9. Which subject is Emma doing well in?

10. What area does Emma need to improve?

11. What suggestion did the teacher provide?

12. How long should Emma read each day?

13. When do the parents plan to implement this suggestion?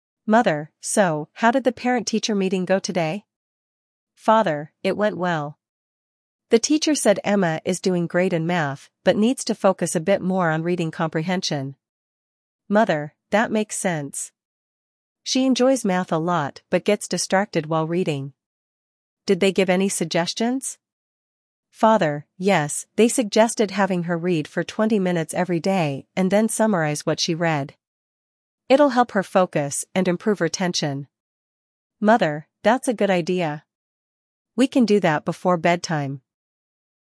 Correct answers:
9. Math
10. Reading comprehension
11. Read for 20 minutes daily and summarize
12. 20 minutes
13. Before bedtime

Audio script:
Mother: So, how did the parent-teacher meeting go today?
Father: It went well. The teacher said Emma is doing great in math but needs to focus a bit more on reading comprehension.
Mother: That makes sense. She enjoys math a lot but gets distracted while reading. Did they give any suggestions?
Father: Yes, they suggested having her read for 20 minutes every day and then summarize what she read. It'll help her focus and improve retention.
Mother: That's a good idea. We can do that before bedtime.